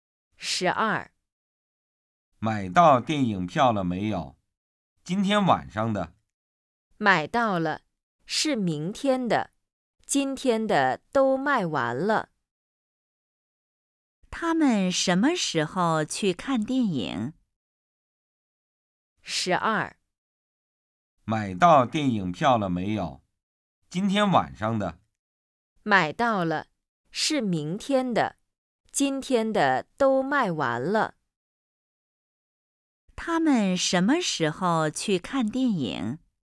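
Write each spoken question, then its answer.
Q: 他们什么时候去看电影?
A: 明天晚上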